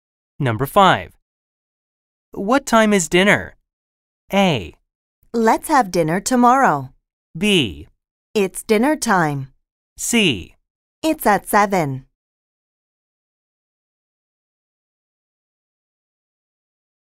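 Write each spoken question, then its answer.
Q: What time is dinner?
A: C: It's at 7.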